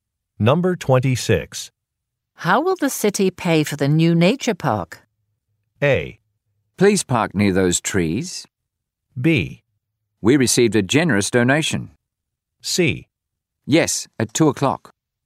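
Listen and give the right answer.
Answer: B: We received a generous donation.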